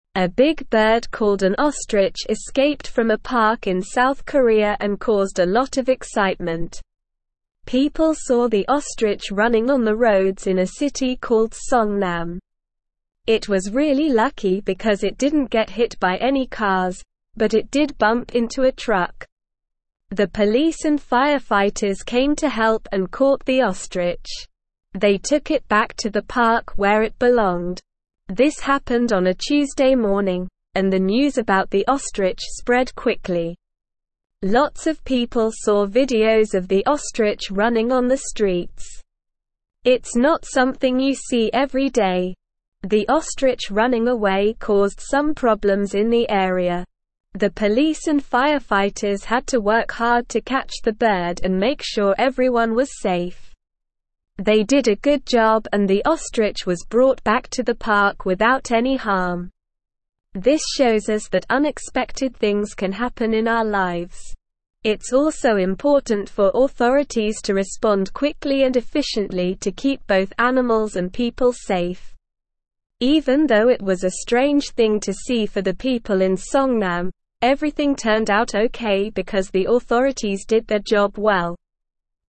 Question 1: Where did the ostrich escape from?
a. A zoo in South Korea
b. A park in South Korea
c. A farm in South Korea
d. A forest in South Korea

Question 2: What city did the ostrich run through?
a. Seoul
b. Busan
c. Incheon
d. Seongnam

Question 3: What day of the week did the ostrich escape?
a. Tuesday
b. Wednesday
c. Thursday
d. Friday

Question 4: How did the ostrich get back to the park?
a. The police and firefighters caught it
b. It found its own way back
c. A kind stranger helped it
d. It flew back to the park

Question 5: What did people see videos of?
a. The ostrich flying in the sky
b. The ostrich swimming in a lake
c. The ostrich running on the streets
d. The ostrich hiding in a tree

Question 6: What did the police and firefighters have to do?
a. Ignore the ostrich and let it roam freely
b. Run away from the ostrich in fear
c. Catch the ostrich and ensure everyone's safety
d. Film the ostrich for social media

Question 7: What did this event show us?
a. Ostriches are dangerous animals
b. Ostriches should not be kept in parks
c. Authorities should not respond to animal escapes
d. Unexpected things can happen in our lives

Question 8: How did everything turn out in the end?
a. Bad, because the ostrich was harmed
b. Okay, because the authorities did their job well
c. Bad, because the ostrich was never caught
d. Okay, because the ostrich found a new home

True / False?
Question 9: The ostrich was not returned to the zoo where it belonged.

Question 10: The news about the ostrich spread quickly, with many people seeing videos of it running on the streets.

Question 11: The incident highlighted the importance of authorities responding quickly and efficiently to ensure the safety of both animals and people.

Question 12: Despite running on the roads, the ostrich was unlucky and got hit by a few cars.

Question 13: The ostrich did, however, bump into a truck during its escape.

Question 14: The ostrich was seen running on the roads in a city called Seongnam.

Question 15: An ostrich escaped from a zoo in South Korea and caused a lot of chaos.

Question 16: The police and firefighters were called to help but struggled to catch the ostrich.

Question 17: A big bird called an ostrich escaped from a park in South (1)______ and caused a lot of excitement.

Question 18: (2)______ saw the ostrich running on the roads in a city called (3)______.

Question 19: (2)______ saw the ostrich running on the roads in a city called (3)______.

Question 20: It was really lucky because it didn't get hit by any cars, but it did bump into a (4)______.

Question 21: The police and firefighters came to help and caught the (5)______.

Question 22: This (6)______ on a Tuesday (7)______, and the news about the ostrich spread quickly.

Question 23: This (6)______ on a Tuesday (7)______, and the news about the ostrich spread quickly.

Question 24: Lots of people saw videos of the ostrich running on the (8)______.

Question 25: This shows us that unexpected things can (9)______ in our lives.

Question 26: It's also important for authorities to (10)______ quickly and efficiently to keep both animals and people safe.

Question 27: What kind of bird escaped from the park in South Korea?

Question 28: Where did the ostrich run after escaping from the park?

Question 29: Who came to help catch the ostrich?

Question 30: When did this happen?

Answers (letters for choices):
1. b
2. d
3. a
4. a
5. c
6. c
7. d
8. b
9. False
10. True
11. True
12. False
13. True
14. True
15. False
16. False
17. Korea
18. People
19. Seongnam
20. truck
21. ostrich
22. happened
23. morning
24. streets
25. happen
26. respond
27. An ostrich escaped from the park in South Korea.
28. The ostrich ran on the roads in a city called Seongnam.
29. The police and firefighters came to help catch the ostrich.
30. This happened on a Tuesday morning.

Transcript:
A big bird called an ostrich escaped from a park in South Korea and caused a lot of excitement. People saw the ostrich running on the roads in a city called Seongnam. It was really lucky because it didn't get hit by any cars, but it did bump into a truck. The police and firefighters came to help and caught the ostrich. They took it back to the park where it belonged.
This happened on a Tuesday morning, and the news about the ostrich spread quickly. Lots of people saw videos of the ostrich running on the streets. It's not something you see every day!
The ostrich running away caused some problems in the area. The police and firefighters had to work hard to catch the bird and make sure everyone was safe. They did a good job and the ostrich was brought back to the park without any harm.
This shows us that unexpected things can happen in our lives. It's also important for authorities to respond quickly and efficiently to keep both animals and people safe. Even though it was a strange thing to see for the people in Seongnam, everything turned out okay because the authorities did their job well.

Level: Level 3